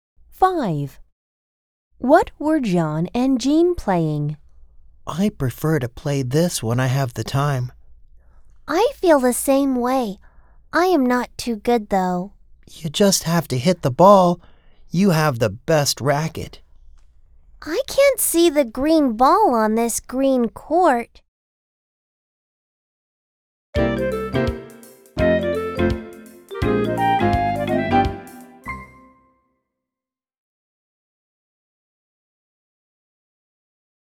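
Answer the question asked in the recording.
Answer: Tennis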